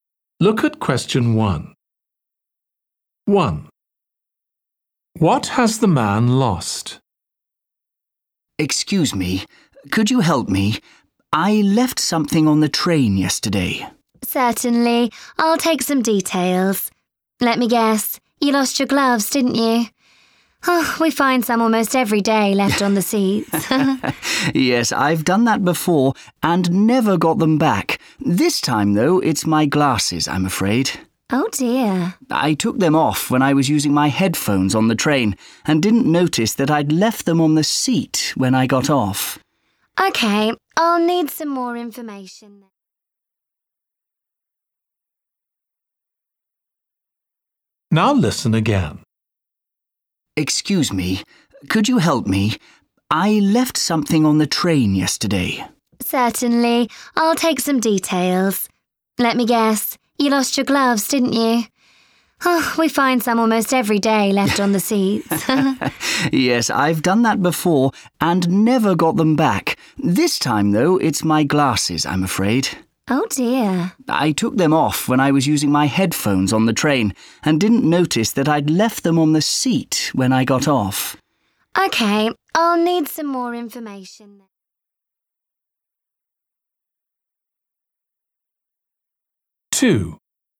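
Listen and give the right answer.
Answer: his glasses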